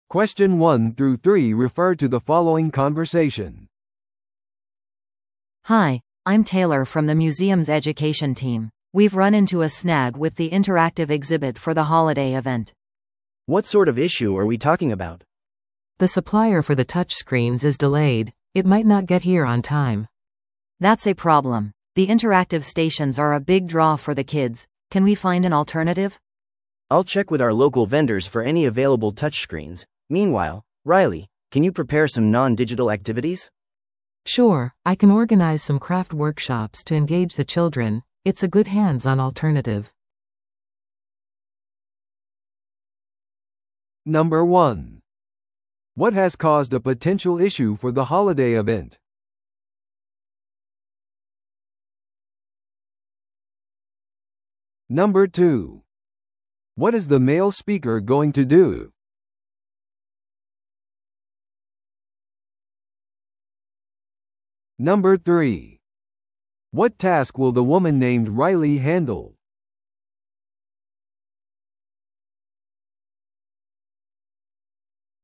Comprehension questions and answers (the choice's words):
Listen to the audio below and answer the questions.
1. What has caused a potential issue for the holiday event?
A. 教育プログラム計画の遅れ。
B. イベントを管理するスタッフが不足している。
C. インタラクティブ展示に影響する納品の遅れ。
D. イベントスケジュールの直前の変更。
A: インタラクティブ展示に影響する納品の遅れ。

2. What is the male speaker going to do?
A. タッチスクリーン用のさらなるサプライヤーに連絡する。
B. 自分でデジタルアクティビティを設定する。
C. インタラクティブ展示をキャンセルする。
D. 工作ワークショップを主催する。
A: タッチスクリーン用のさらなるサプライヤーに連絡する。

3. What task will the woman named Riley handle?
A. デジタルインタラクティブステーションの整理。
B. 新しいタッチスクリーン業者を捜す。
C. 非デジタルのバックアップアクティビティを準備する。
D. 遅延についてサプライヤーと話をする。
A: 非デジタルのバックアップアクティビティを準備する。

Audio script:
A: Hi, I'm Taylor from the museum's education team. We've run into a snag with the interactive exhibit for the holiday event.
B: What sort of issue are we talking about?
C: The supplier for the touchscreens is delayed. It might not get here on time.
A: That's a problem. The interactive stations are a big draw for the kids. Can we find an alternative?
B: I'll check with our local vendors for any available touchscreens. Meanwhile, Riley, can you prepare some non-digital activities?
C: Sure, I can organize some craft workshops to engage the children. It's a good hands-on alternative.